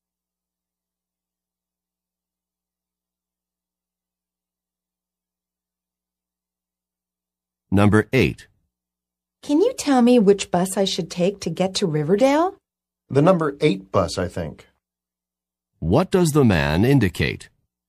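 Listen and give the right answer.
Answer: He is not completely sure, but thinks it is the number 8 bus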